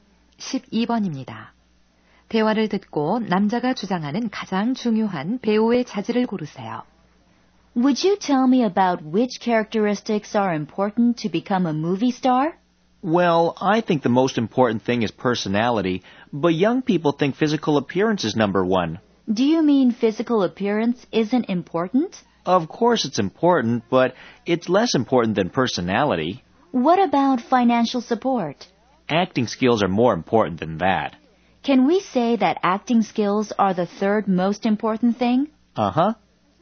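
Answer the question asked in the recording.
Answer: 성격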